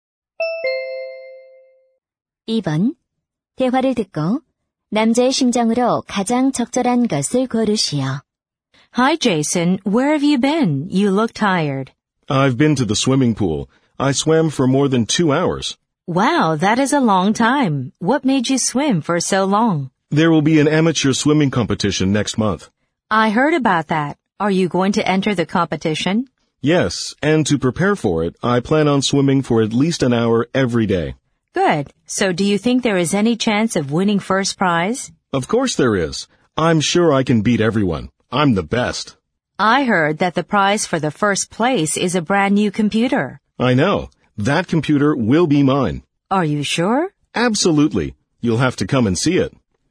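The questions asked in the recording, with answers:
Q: 대화를 듣고 남자의 심정으로 가장 적절한 것을 고르시오.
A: 자신감 있는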